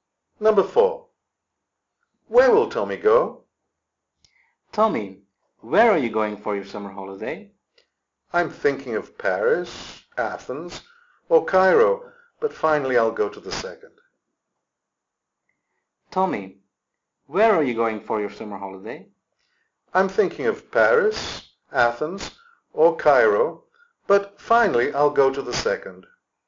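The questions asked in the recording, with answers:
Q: Where will Tommy go?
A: Athens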